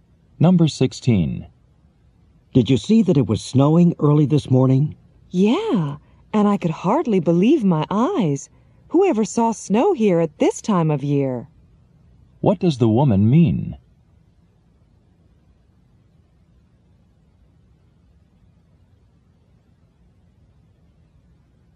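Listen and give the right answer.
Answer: She was surprised that it snowed at this time of year.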